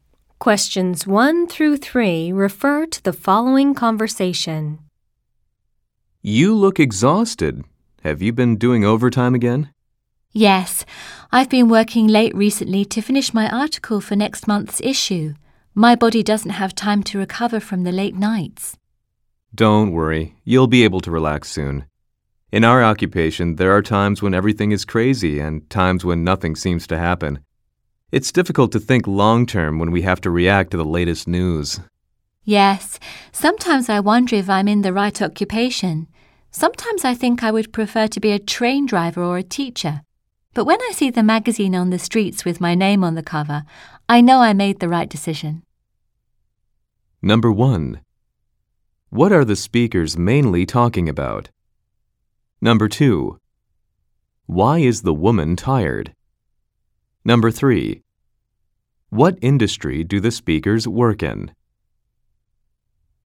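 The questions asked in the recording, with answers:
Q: Why is the woman tired?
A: She has been working late to finish her article

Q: What industry do the speakers work in?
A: Magazine publishing (journalism)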